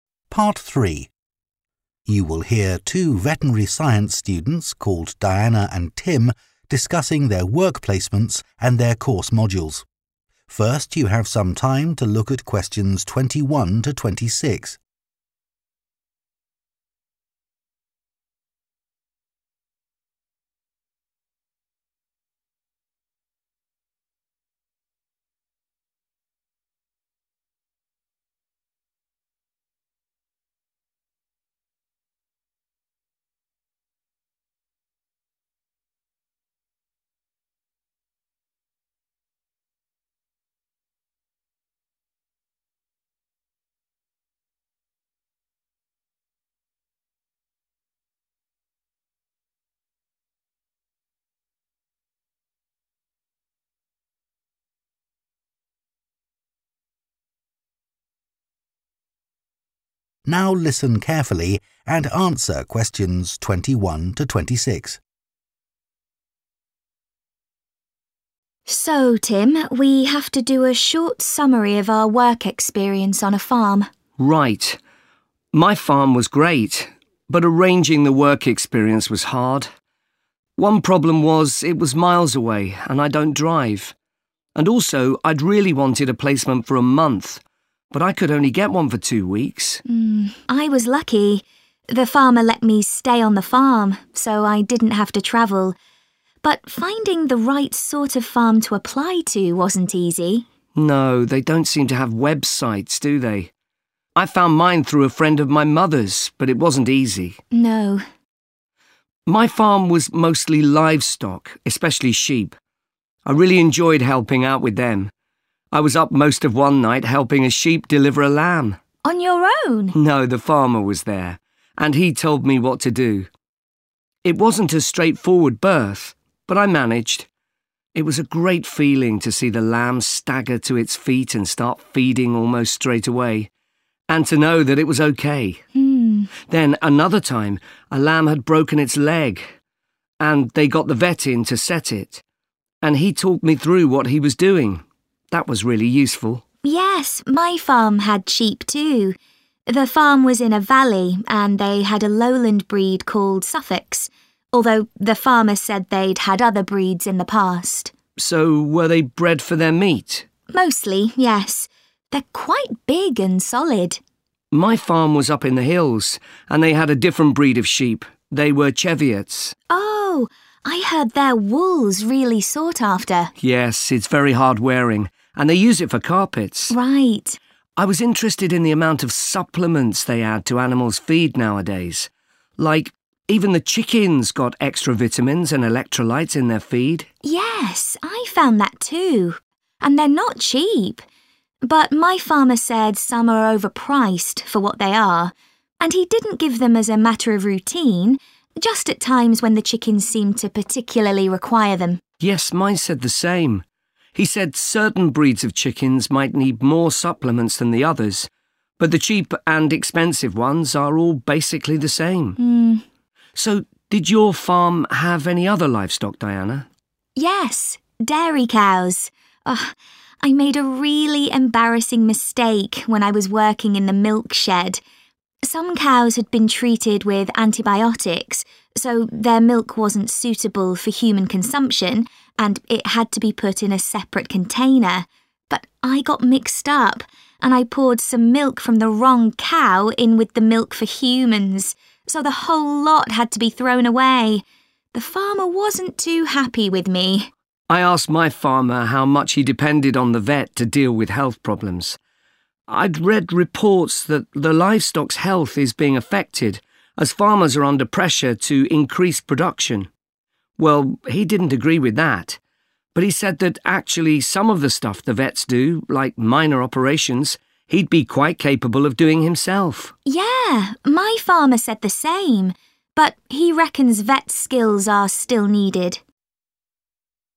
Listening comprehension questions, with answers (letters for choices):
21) What problem did both Diana and Tim have when arranging their work experience?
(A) making initial contact with suitable farms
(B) organising transport to and from the farm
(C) finding a placement for the required length of time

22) Tim was pleased to be able to help.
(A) lamb that had a broken leg.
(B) a sheep that was having difficulty giving birth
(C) a newly born lamb that was having trouble feeding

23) Diana says the sheep on her farm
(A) were of various different varieties.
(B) were mainly reared for their meat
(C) had better quality wool than sheep on the hills.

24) What did the students learn about adding supplements to chicken feed?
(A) These should only be given if specially needed.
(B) It is worth paying extra for the most effective ones.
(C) The amount given at one time should be limited.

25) What happened when Diana was working with dairy cows?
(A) She identified some cows incorrectly.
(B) She accidentally threw some milk away.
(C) She made a mistake when storing milk.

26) What did both farmers mention about vets and farming?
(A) Vets are failing to cope with some aspects of animal health.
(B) There needs to be a fundamental change in the training of vets.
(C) Some jobs could be done by the farmer rather than by a vet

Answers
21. A
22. B
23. B
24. A
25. C
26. C

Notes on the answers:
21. Diana chia sẻ rằng việc tìm một nông trại phù hợp để nộp đơn là rất khó khăn, và Tim cũng đồng tình với ý kiến này. Do đó, đáp án chính xác là A. Các đáp án B và C không phù hợp vì chỉ có Tim gặp vấn đề về khoảng cách và thời gian thực tập, còn Diana không gặp phải vấn đề này.
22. Tim thích thú khi giúp đỡ một con cừu sinh con, và anh kể rằng đã giúp một con cừu sinh nở vào ban đêm. Vì vậy, đáp án chính xác là B. Dù có đề cập đến việc con cừu bị gãy chân, nhưng thông tin này không l